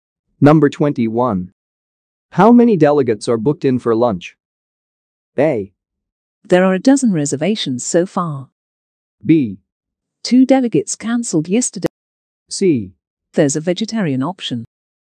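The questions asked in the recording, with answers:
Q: How many delegates are booked in for lunch?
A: A: There are 12 reservations so far.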